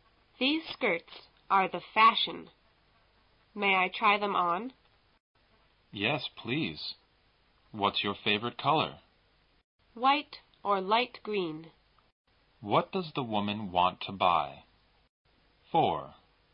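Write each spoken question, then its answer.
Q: What does the woman want to buy?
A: Skirts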